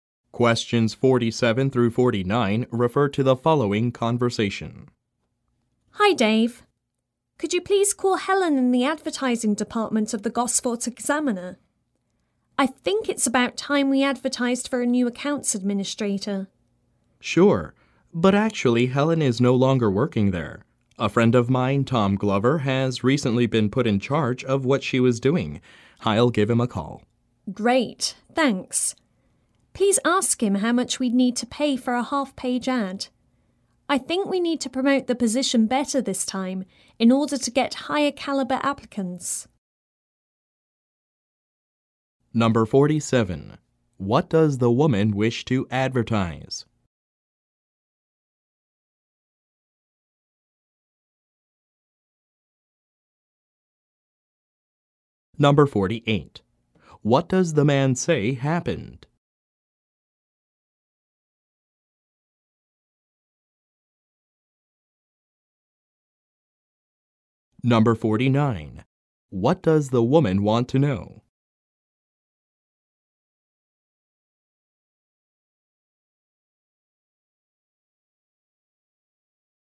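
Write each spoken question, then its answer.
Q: What does the woman wish to advertise?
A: A job opening for a new accounts administrator

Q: What does the man say happened?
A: Helen left, and Tom Glover took over her job

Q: What does the woman want to know?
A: How much a half-page ad costs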